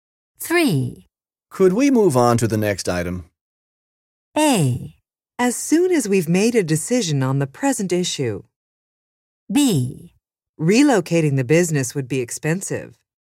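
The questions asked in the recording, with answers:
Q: Could we move on to the next item?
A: A: As soon as we've made a decision on the present issue.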